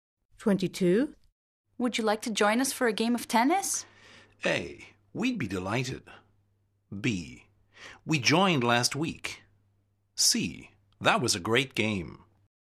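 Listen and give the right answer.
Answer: A: We'd be delighted.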